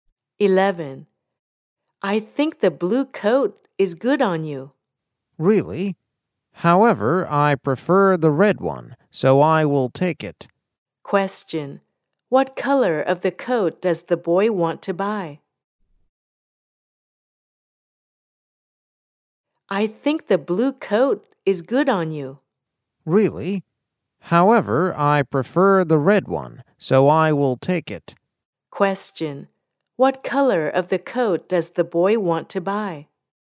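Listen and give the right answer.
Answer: Red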